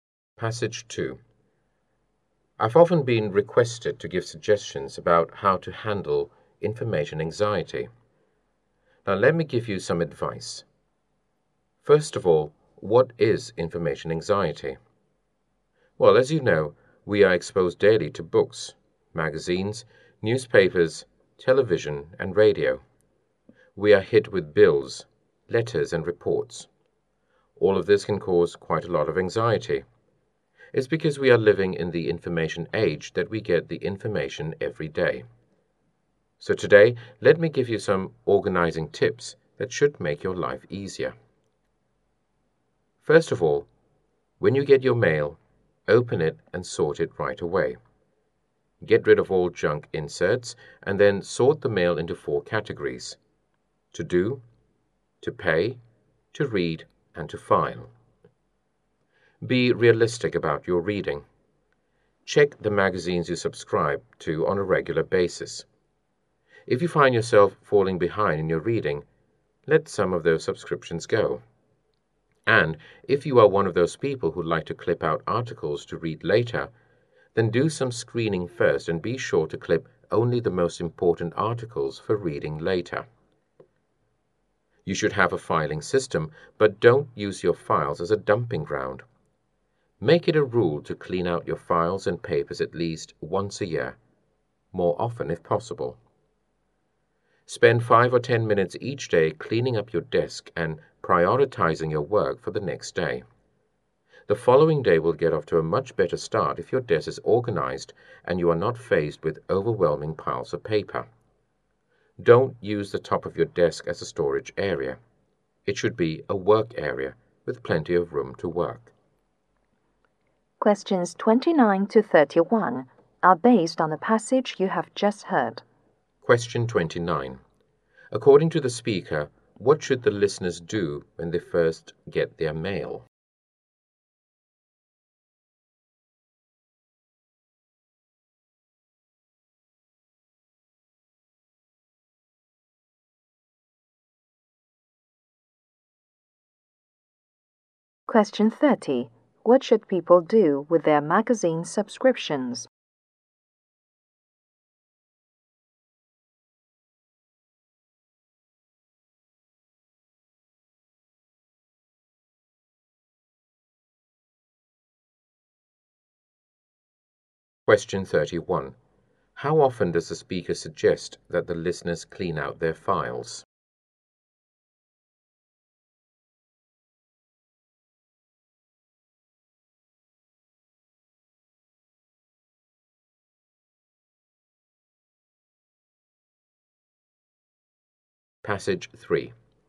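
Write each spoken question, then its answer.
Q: According to the speaker, what should the listeners do when they first get their mail?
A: Open it and sort it right away

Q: What should people do with their magazine subscriptions?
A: Let some go if they fall behind in reading

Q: How often does the speaker suggest that the listeners clean out their files?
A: At least once a year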